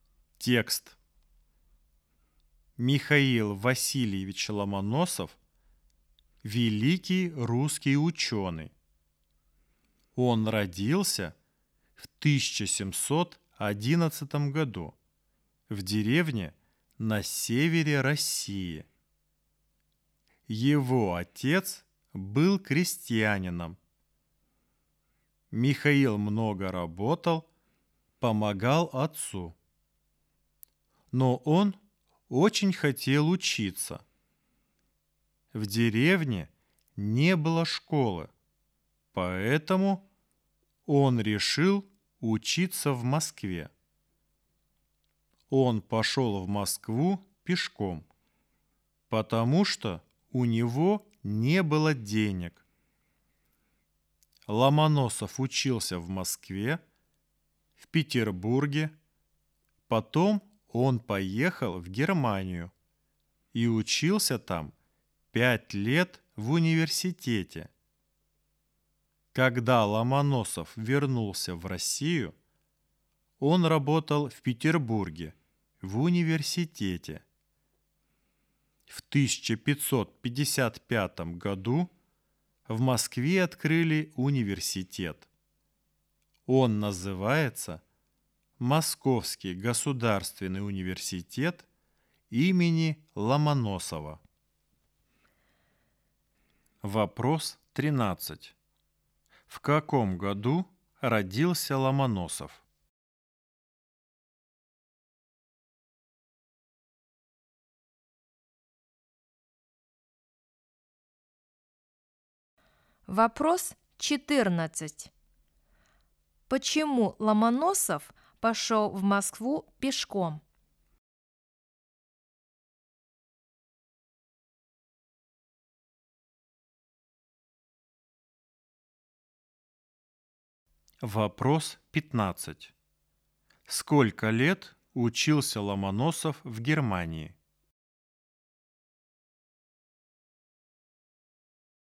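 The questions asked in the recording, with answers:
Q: В каком году родился Ломоносов?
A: в 1711 году

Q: Почему Ломоносов пошел в Москву пешком?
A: потому что у него не было денег

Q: Сколько лет учился Ломоносов в Германии?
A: 5 лет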